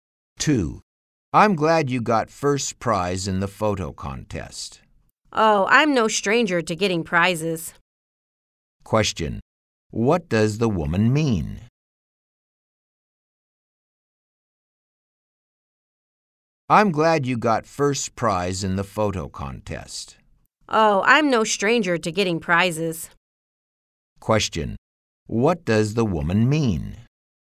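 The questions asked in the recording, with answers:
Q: What does the woman mean?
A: She often gets prizes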